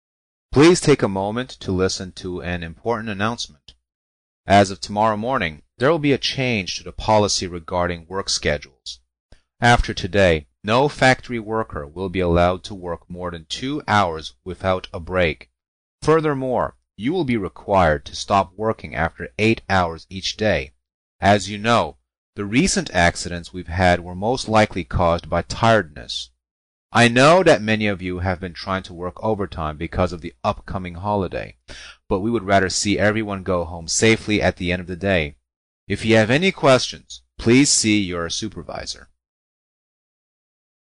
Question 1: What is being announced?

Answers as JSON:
{"1": "(C) A policy change"}